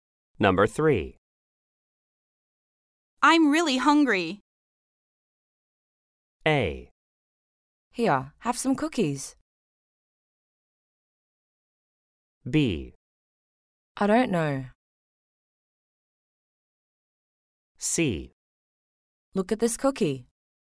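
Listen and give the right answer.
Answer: A: Here, have some cookies.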